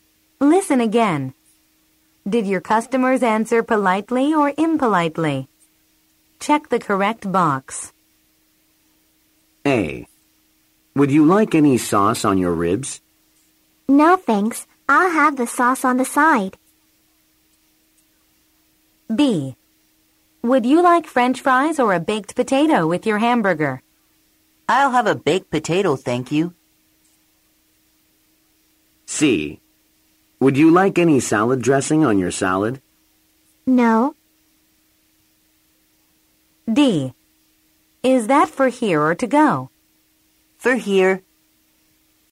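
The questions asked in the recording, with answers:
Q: Did your customers answer politely or impolitely?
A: politely

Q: Did your customers answer politely or impolitely?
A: politely

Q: Did your customers answer politely or impolitely?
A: impolitely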